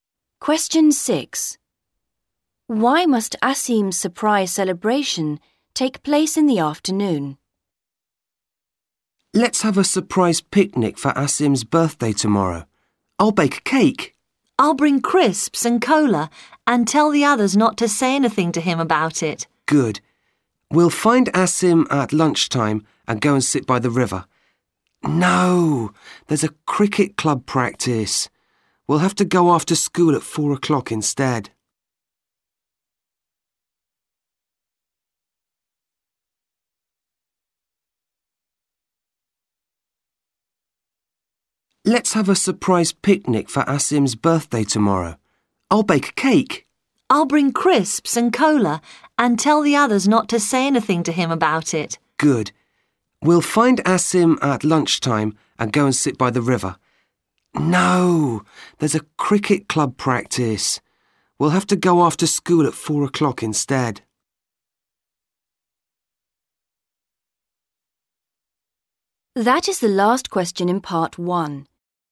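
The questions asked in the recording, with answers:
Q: Why must Asim's surprise celebration take place in the afternoon?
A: There is a cricket club practice at lunchtime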